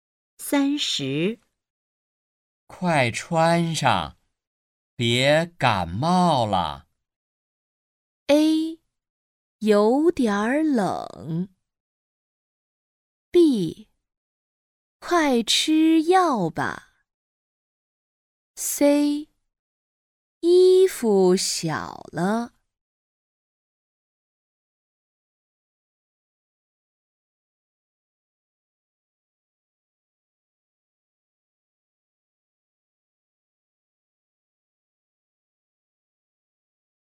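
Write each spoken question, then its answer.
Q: 快穿上,别感冒了。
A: A: 有点冷。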